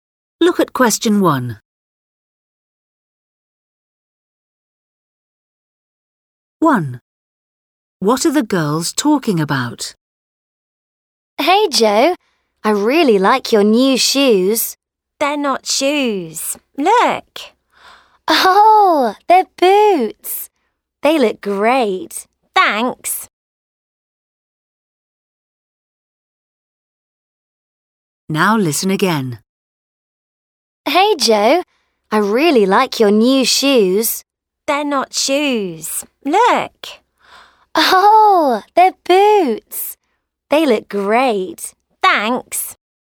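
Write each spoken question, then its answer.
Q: What are the girls talking about?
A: boots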